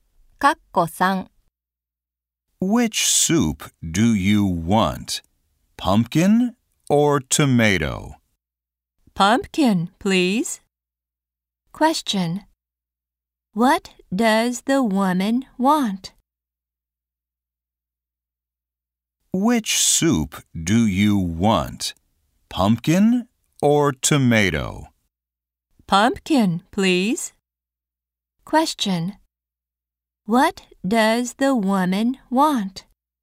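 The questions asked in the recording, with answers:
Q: What does the woman want?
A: Pumpkin soup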